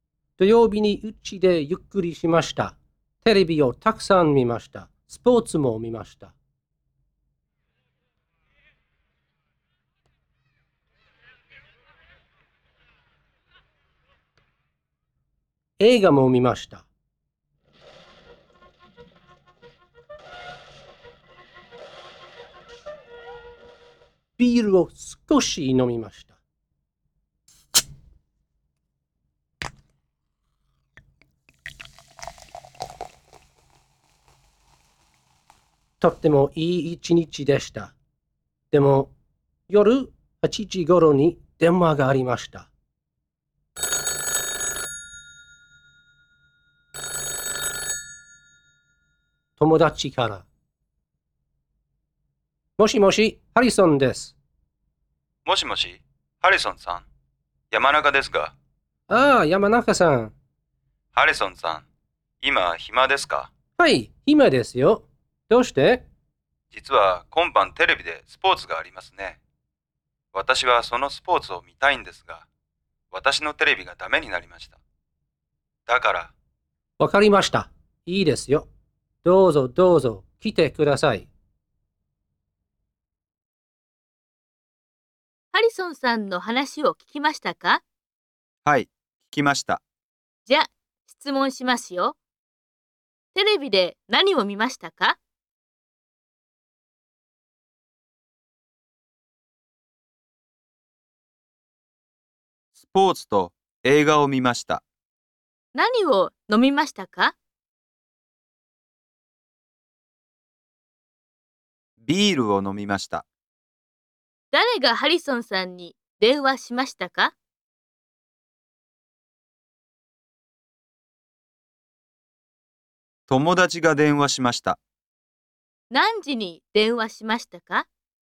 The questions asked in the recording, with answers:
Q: テレビで何を見ましたか?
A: スポーツと映画を見ました。

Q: 何を飲みましたか?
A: ビールを飲みました。

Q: 誰がハリソンさんに電話しましたか?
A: 友達が電話しました。

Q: 何時に電話しましたか?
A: 8時ごろに電話しました。